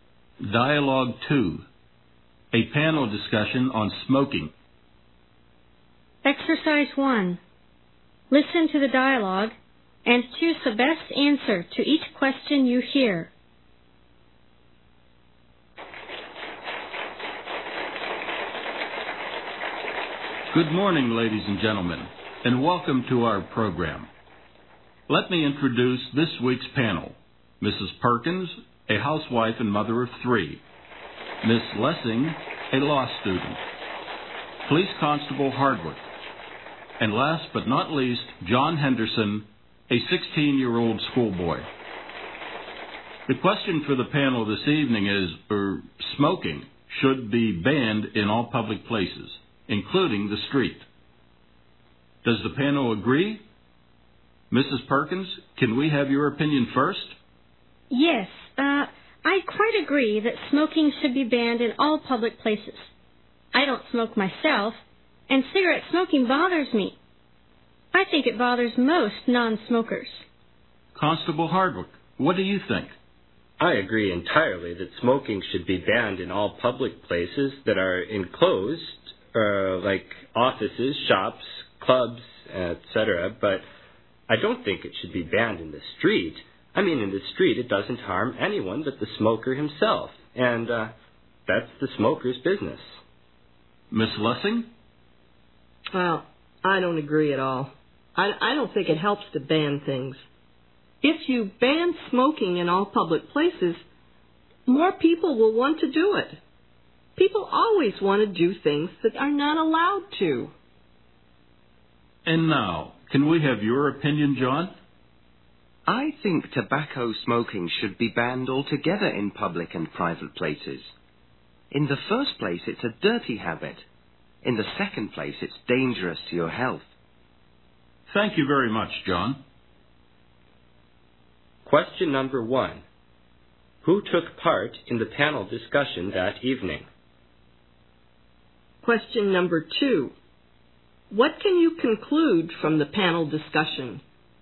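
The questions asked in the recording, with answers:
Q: Who took part in the panel discussion that evening?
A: A housewife, a law student, a police constable and a schoolboy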